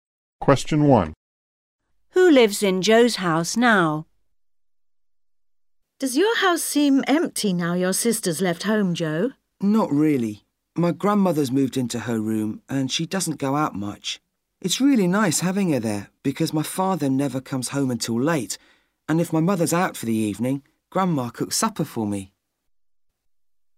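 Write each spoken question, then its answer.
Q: Who lives in Joe's house now?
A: His grandmother (with his parents)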